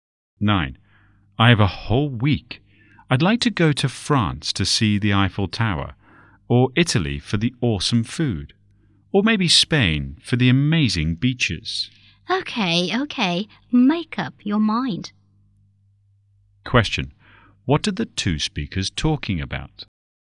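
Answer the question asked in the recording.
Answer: Where to go for a week's holiday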